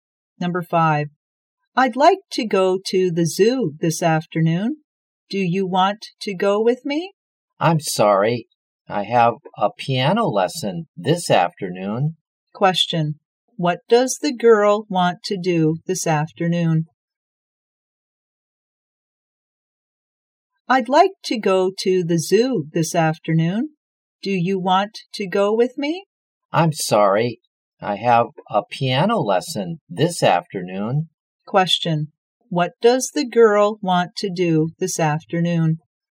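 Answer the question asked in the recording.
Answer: Go to the zoo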